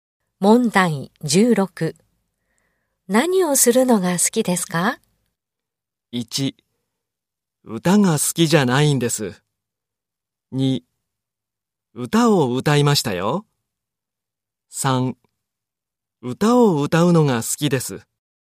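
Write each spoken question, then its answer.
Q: 何をするのが好きですか?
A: 3: 歌を歌うのが好きです。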